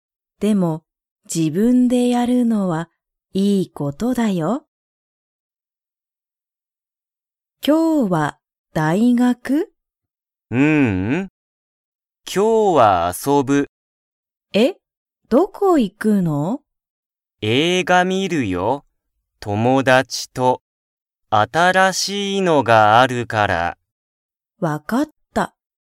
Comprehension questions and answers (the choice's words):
孝たかしは、どこへ行いきますか?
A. 大学だいがく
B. 映画えいが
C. 友達ともだちの家いえ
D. 新あたらしい店みせ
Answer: 映画えいが

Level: Level 1